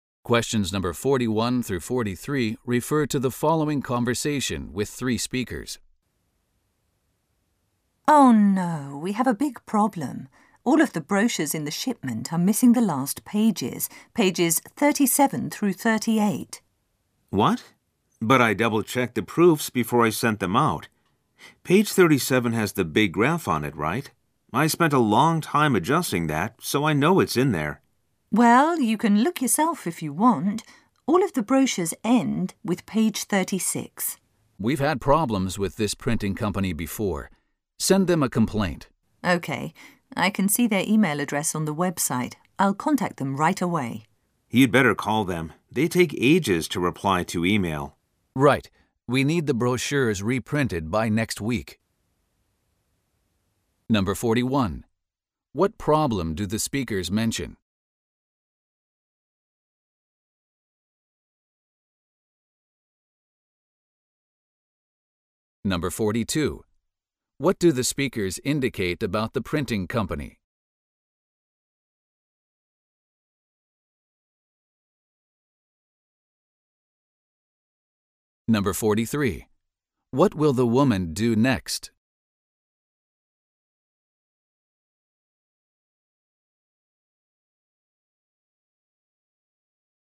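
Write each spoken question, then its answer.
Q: What problem do the speakers mention?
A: The brochures are missing their last pages (pages 37–38).

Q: What do the speakers indicate about the printing company?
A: They have had problems with it before, and it is slow to reply to email.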